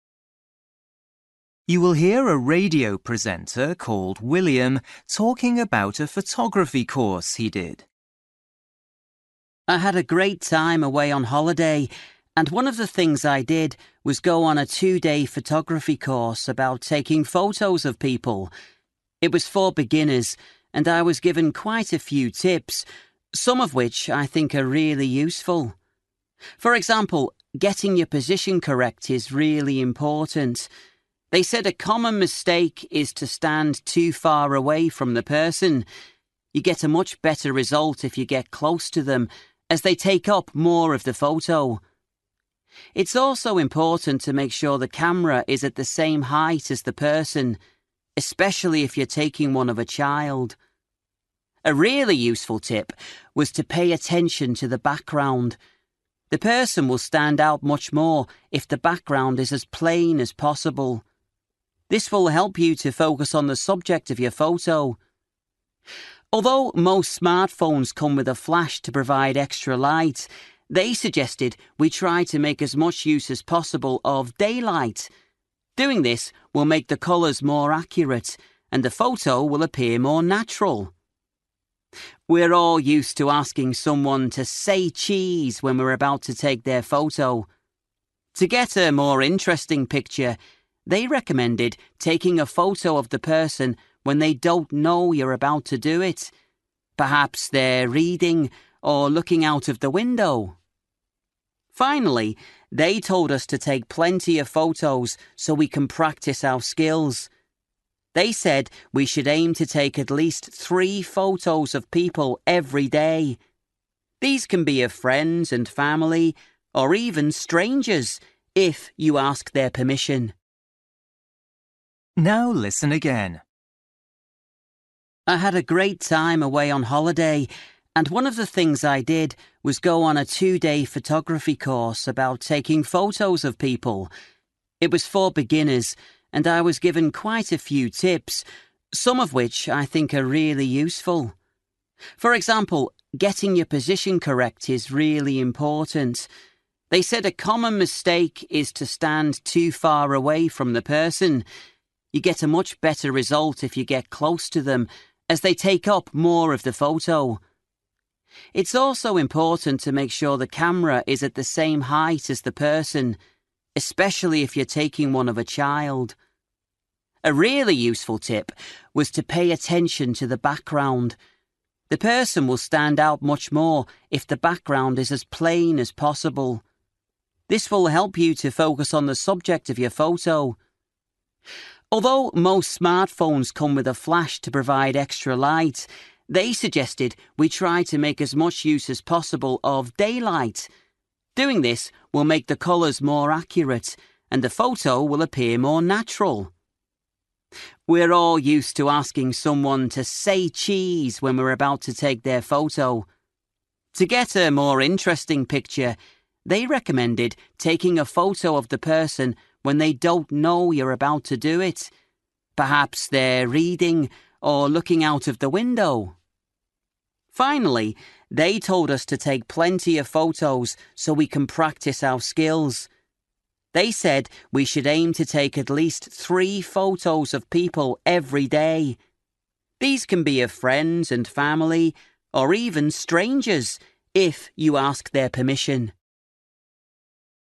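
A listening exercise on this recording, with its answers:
For each question, write the correct answer in the gap. Write one or two words or a number or a date or a time. You will hear a radio presenter called William talking about a photography course he did.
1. The photography course lasted (1) and was for beginners.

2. Make sure the camera is at the same (2) as the person.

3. Stand the person in front of a (3) background.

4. Taking photos in daylight can help make sure colours are (4)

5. Take a photo of your subject when they are (5) or looking out of the window.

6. Try to take at least (6) of people every day.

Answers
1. two days
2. height
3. plain
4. accurate
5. reading
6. 3 photos

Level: Luyện nghe trình độ B1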